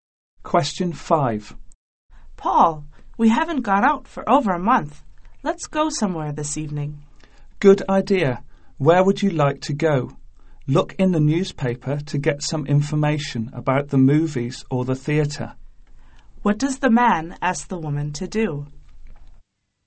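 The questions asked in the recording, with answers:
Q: What does the man ask the woman to do?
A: Look in the newspaper for information about movies or the theatre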